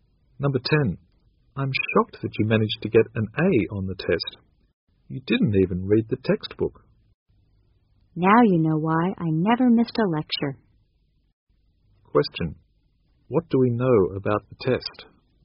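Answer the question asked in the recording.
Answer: It was based on the lectures.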